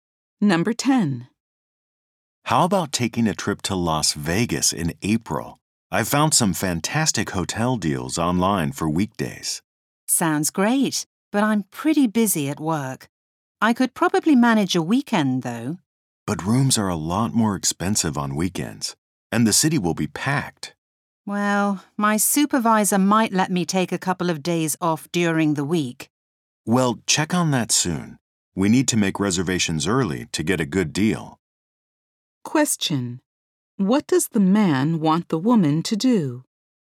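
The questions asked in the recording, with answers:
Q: What does the man want the woman to do?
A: Ask her supervisor soon about taking days off during the week.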